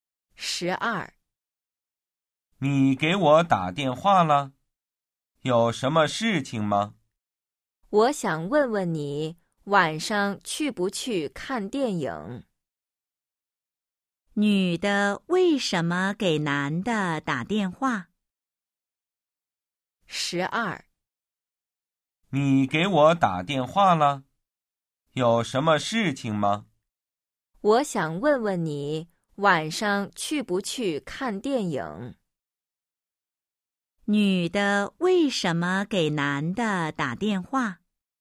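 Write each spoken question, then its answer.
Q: 女的为什么给男的打电话?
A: 想问他晚上去不去看电影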